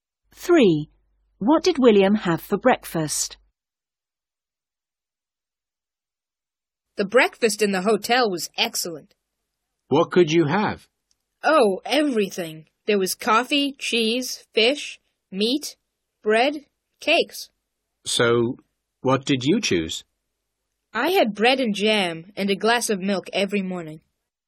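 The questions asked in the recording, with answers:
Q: What did William have for breakfast?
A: Bread and jam and a glass of milk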